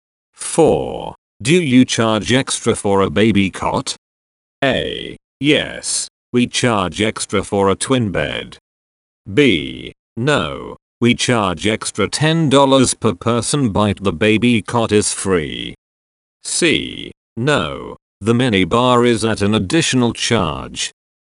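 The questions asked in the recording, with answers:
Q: Do you charge extra for a baby cot?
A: B: No, we charge extra $10 per person but the baby cot is free.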